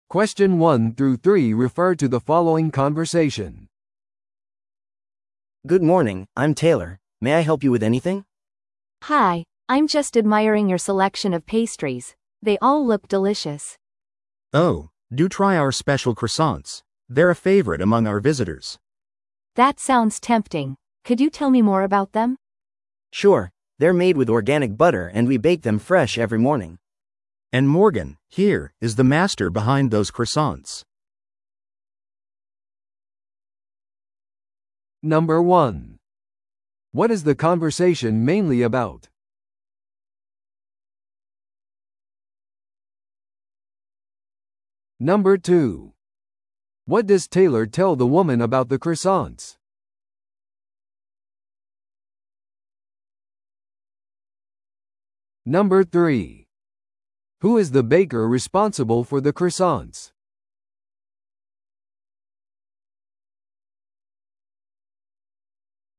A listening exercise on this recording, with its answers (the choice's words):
Listen to the audio below and answer the questions.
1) What is the conversation mainly about?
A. ベーカリーイベントの準備。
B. 特別なペストリーオファーについての話。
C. 訪問者に従業員を紹介する。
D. 開店時間の問い合わせ。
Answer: 特別なペストリーオファーについての話。

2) What does Taylor tell the woman about the croissants?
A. フランスから輸入されている。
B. オーガニックの材料で作られている。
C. 午後からしか手に入らない。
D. 前もって注文する必要がある。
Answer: オーガニックの材料で作られている。

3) Who is the baker responsible for the croissants?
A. ベーカリーを訪れている女性。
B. テイラーと名乗る男性。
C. モーガンと名乗る話者の一人。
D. 注文を受けている女性。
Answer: モーガンと名乗る話者の一人。

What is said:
A: Good morning, I'm Taylor. May I help you with anything?
B: Hi, I'm just admiring your selection of pastries. They all look delicious!
C: Oh, do try our special croissants; they're a favorite among our visitors!
B: That sounds tempting. Could you tell me more about them?
A: Sure, they're made with organic butter and we bake them fresh every morning.
C: And Morgan, here, is the master behind those croissants!